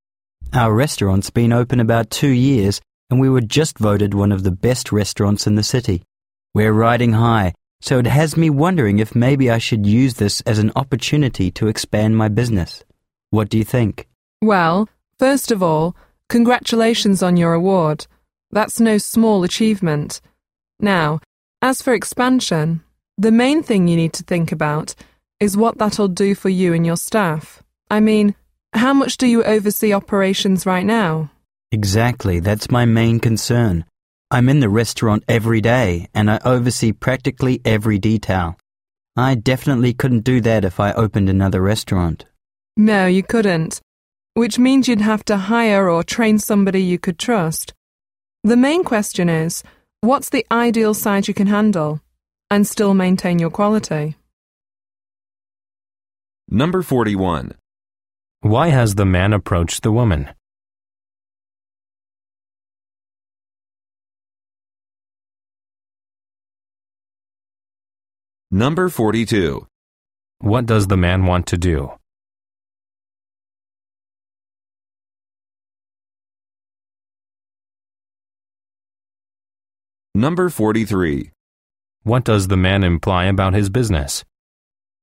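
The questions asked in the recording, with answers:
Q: Why has the man approached the woman?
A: To ask her advice about expanding his business

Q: What does the man want to do?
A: Expand his business (open another restaurant)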